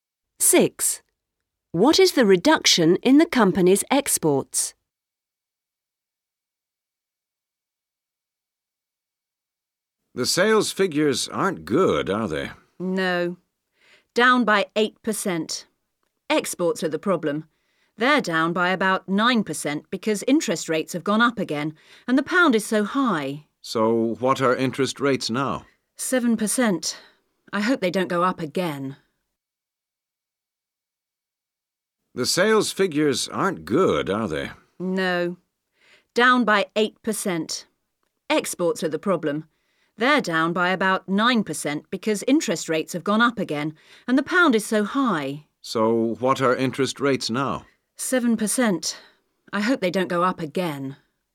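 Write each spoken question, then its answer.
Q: What is the reduction in the company's exports?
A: About 9%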